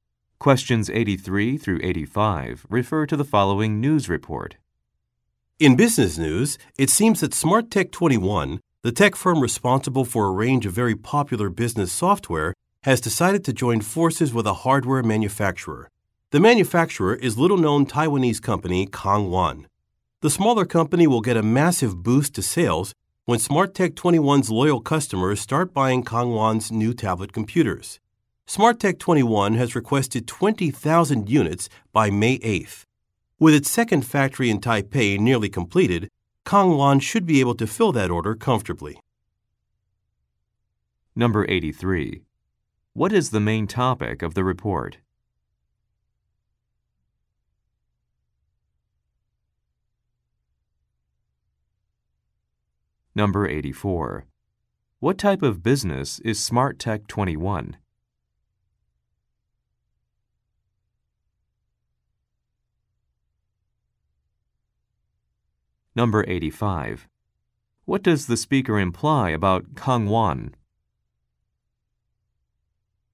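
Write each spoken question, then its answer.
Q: What is the main topic of the report?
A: A partnership between SmartTech 21 and Kangwan

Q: What type of business is SmartTech 21?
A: A business software company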